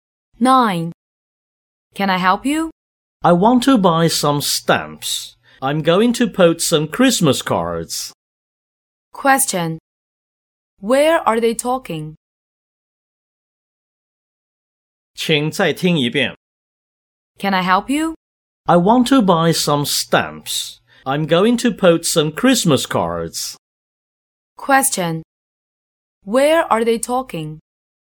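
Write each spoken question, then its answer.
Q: Where are they talking?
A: At a post office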